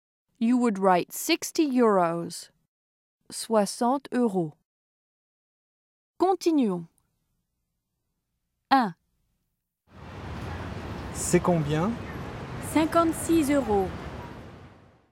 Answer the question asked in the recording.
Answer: 56 euros.